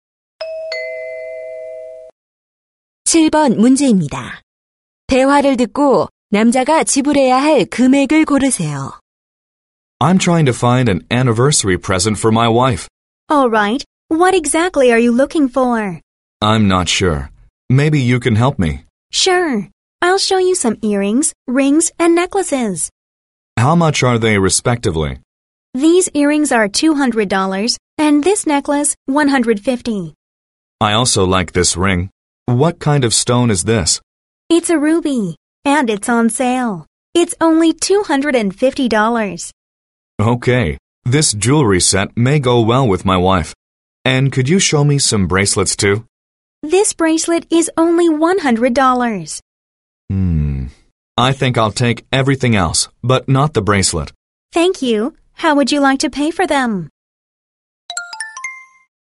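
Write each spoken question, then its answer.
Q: 대화를 듣고 남자가 지불해야 할 금액을 고르세요.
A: 600달러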